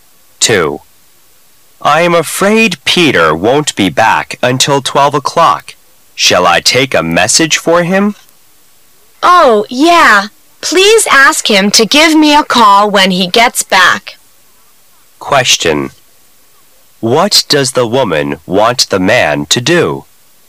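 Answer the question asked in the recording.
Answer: Ask Peter to call her when he gets back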